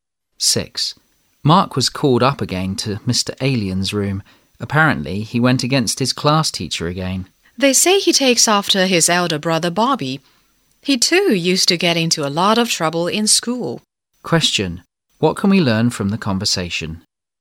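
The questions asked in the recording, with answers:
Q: What can we learn from the conversation?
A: Mark, like his brother Bobby, often gets into trouble at school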